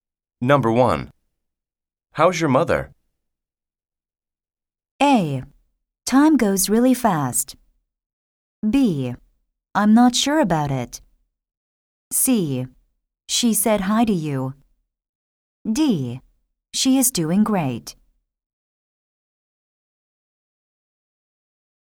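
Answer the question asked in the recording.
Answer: D: She is doing great.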